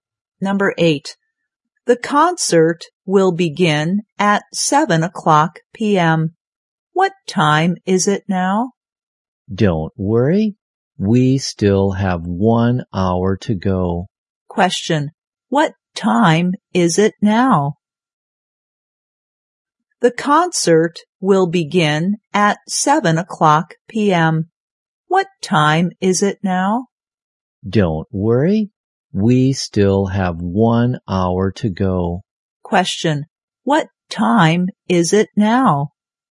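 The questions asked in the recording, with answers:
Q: What time is it now?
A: 6 p.m.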